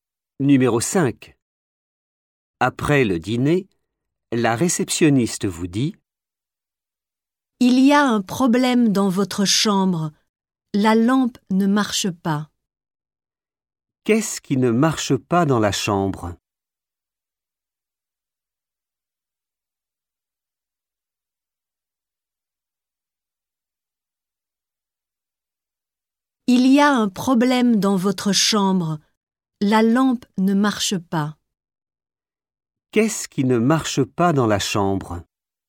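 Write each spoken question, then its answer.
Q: Qu'est-ce qui ne marche pas dans la chambre?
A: la lampe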